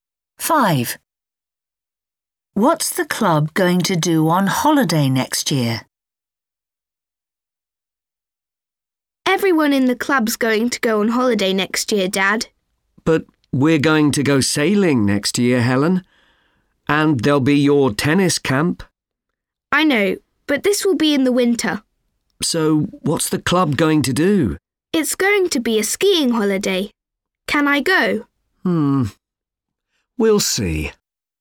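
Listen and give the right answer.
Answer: go skiing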